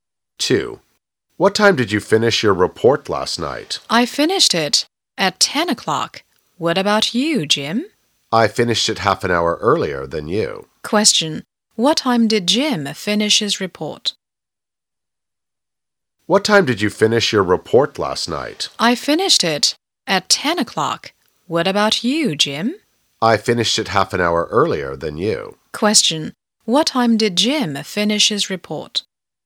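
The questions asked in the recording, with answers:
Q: What time did Jim finish his report?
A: At half past nine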